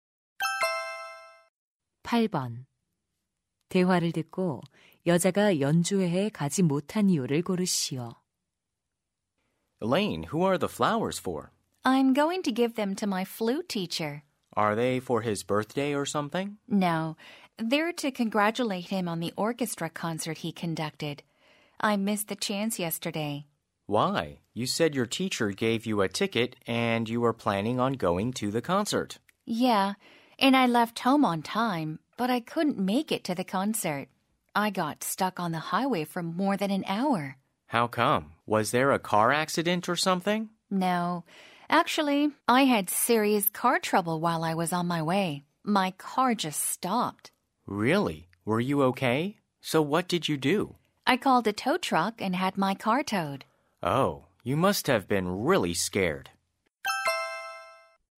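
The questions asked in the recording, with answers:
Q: 대화를 듣고 여자가 연주회에 가지 못한 이유를 고르시오.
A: 가는 길에 차가 고장 나서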